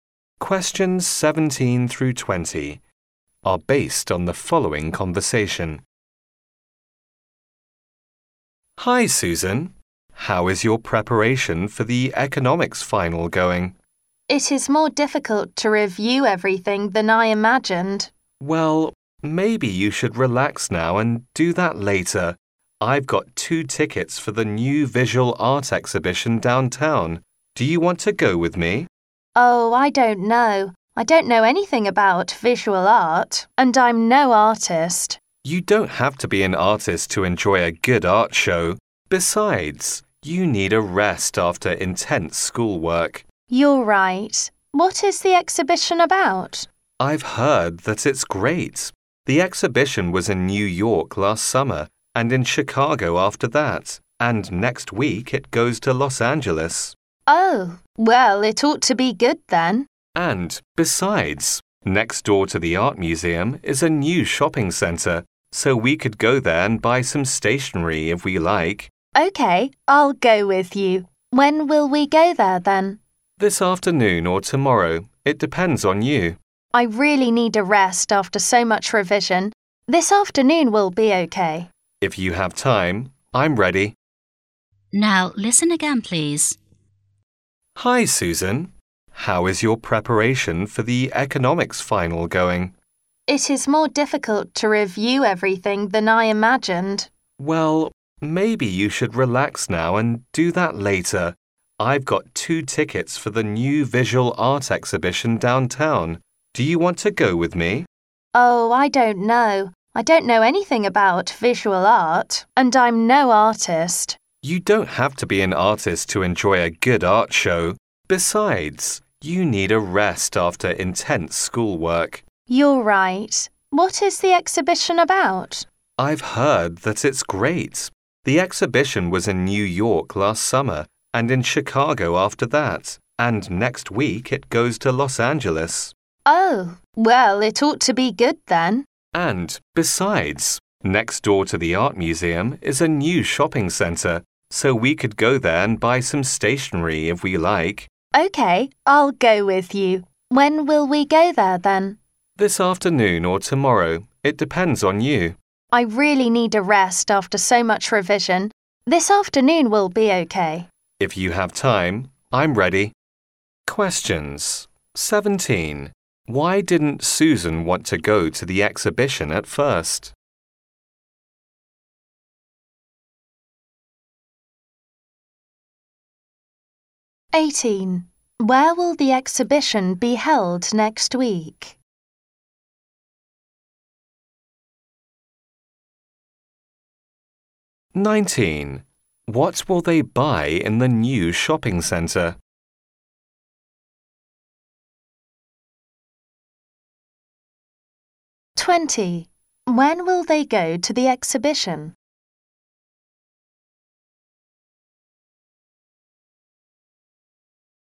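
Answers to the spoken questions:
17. She doesn't know anything about visual art
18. In Los Angeles
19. Stationery
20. This afternoon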